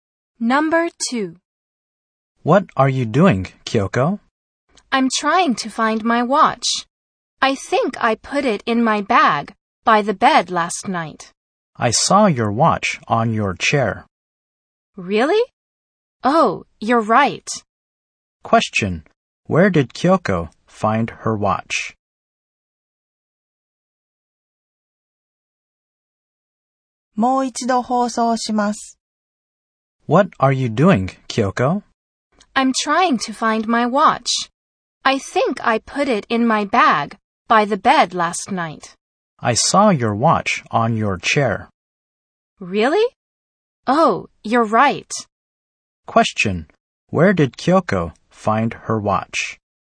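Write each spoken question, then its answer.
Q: Where did Kyoko find her watch?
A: On her chair.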